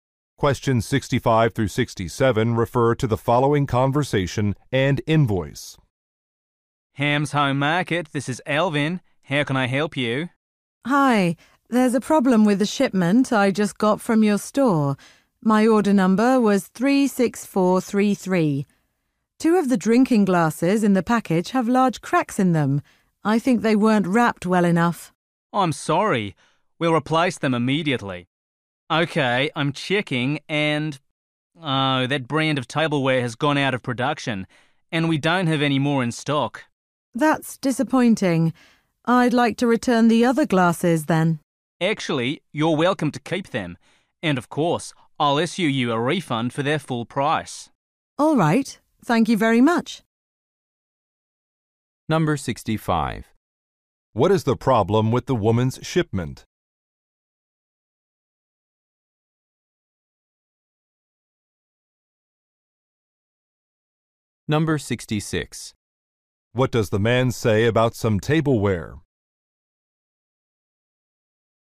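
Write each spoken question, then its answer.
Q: What is the problem with the woman's shipment?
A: Two glasses are cracked

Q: What does the man say about some tableware?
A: It is no longer produced/out of stock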